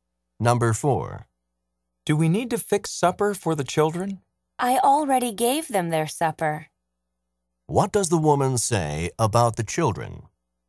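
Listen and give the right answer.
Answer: They have already had supper.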